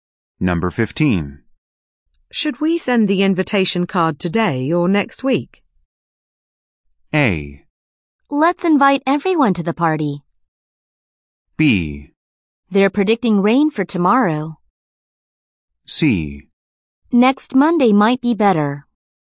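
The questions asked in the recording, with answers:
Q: Should we send the invitation card today or next week?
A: C: Next Monday might be better.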